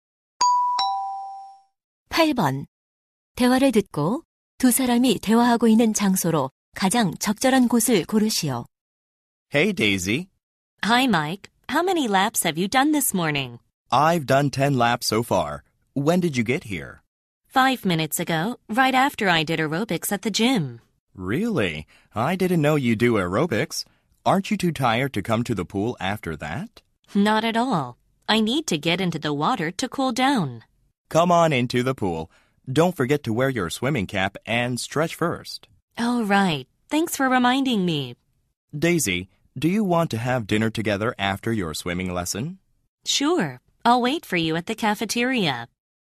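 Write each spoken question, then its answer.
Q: 대화를 듣고 두 사람이 대화하고 있는 장소로 가장 적절한 곳을 고르시오.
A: 수영장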